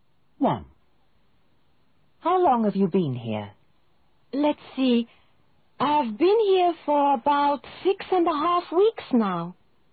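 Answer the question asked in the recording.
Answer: about 6.5 weeks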